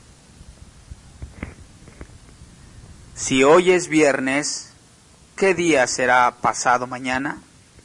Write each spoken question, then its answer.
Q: Si hoy es viernes, ¿qué día será pasado mañana?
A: Será domingo.